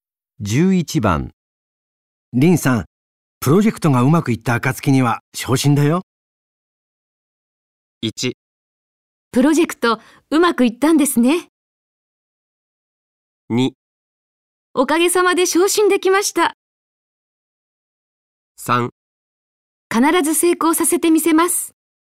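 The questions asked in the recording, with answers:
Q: 林さん、プロジェクトがうまくいった暁には昇進だよ。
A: 3: 必ず成功させてみせます。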